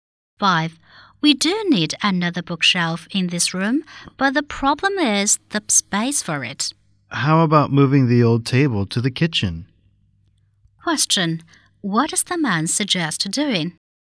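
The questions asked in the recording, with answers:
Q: What does the man suggest doing?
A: Moving the old table to the kitchen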